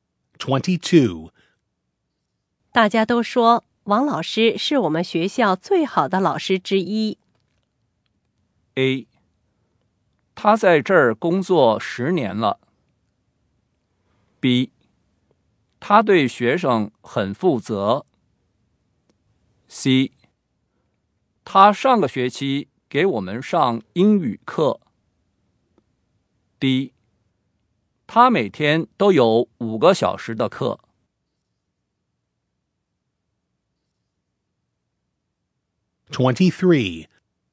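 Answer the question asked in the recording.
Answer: B: 他对学生很负责。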